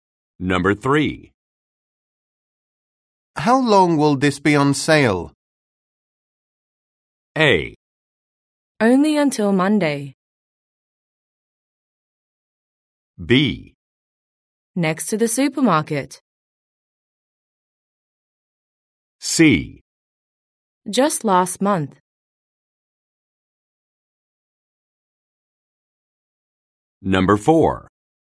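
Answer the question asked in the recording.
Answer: A: Only until Monday.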